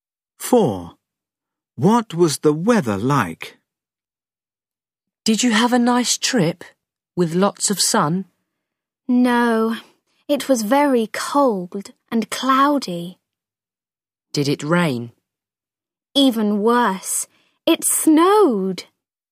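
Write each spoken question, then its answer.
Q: What was the weather like?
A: cold, cloudy and snowy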